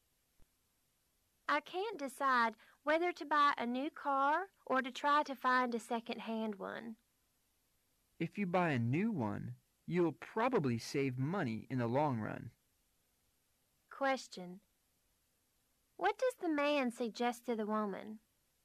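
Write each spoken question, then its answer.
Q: What does the man suggest to the woman?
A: Buy a new car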